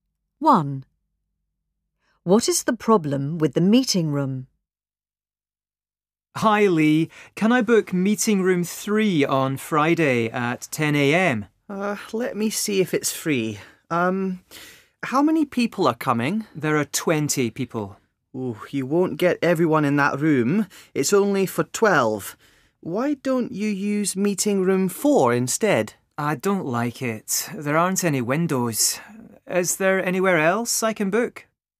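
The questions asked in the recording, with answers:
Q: What is the problem with the meeting room?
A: It is too small for 20 people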